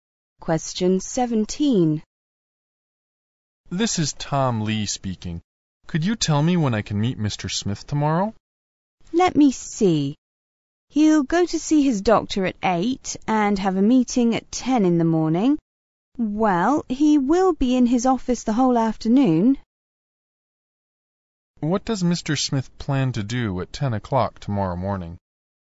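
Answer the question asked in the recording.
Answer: Have a meeting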